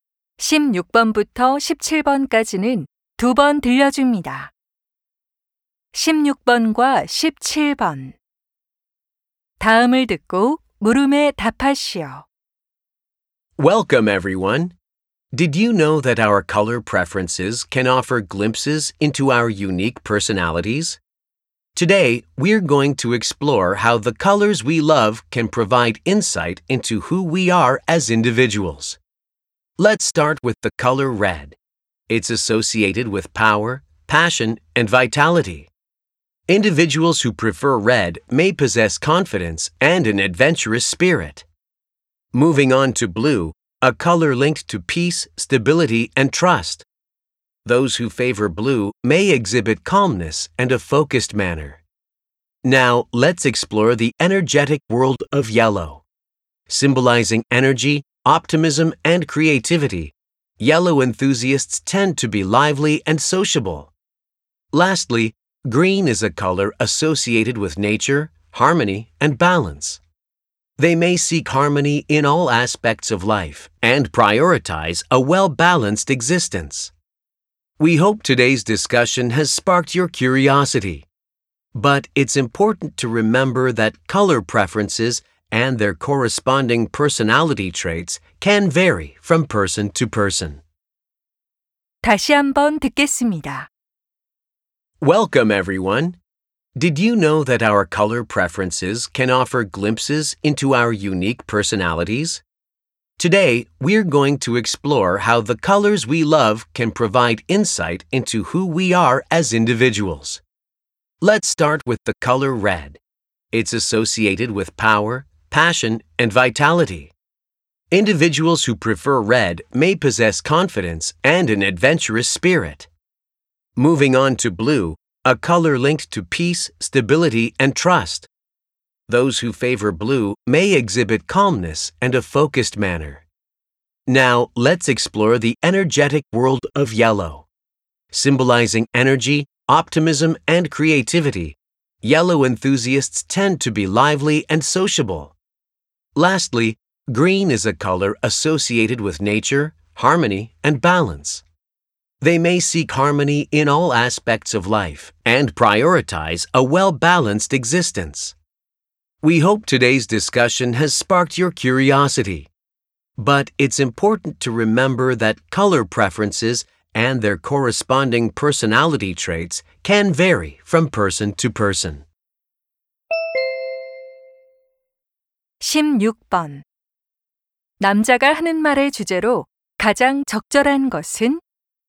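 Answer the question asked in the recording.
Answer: 좋아하는 색상과 성격의 관계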